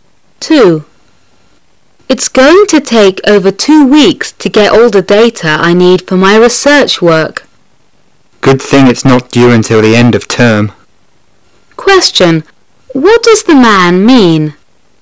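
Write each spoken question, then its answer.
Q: What does the man mean?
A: There is enough time before it is due.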